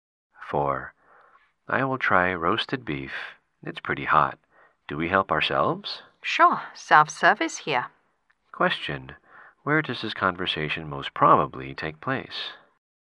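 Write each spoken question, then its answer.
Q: Where does this conversation most probably take place?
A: In a self-service restaurant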